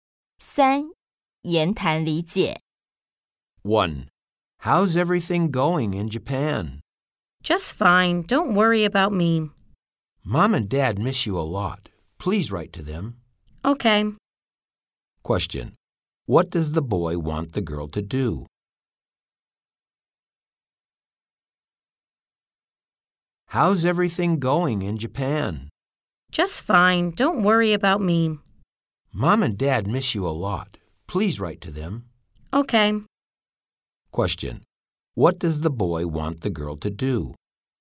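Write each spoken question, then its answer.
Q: what does the boy want the girl to do?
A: Write to Mom and Dad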